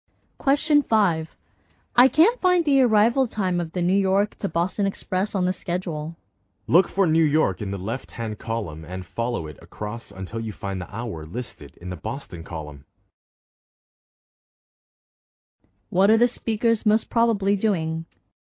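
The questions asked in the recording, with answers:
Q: What are the speakers most probably doing?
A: Reading a train schedule.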